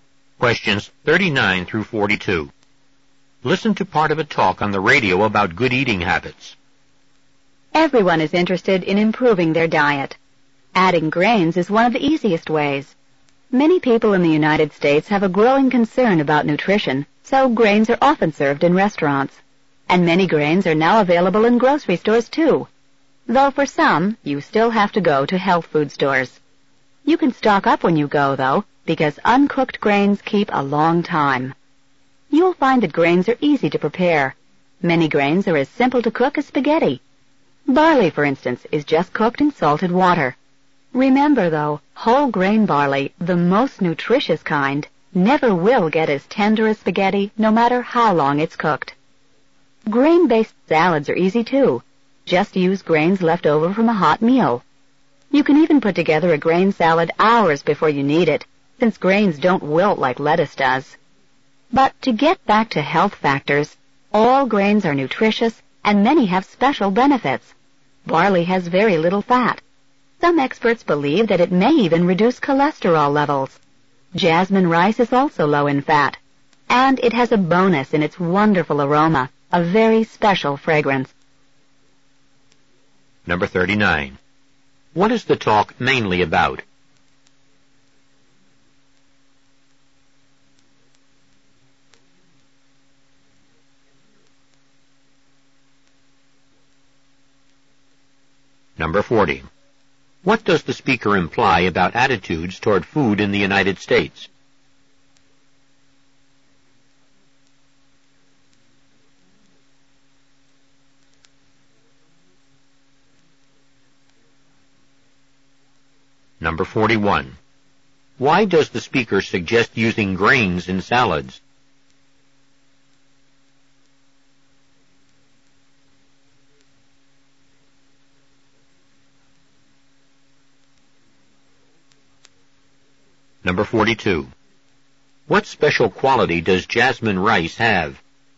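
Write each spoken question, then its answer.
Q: What is the talk mainly about?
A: Adding grains to improve the diet

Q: What does the speaker imply about attitudes toward food in the United States?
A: Many people are increasingly concerned about nutrition

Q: Why does the speaker suggest using grains in salads?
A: They are easy to use and don't wilt like lettuce, so the salad can be made hours ahead

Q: What special quality does jasmine rice have?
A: A wonderful aroma (special fragrance)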